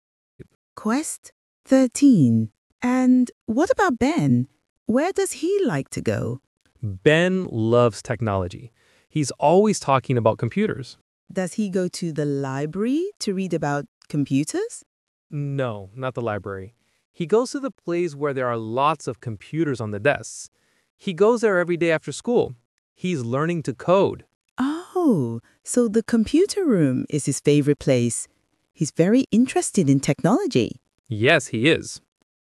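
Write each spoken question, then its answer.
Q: Where does he like to go?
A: the computer room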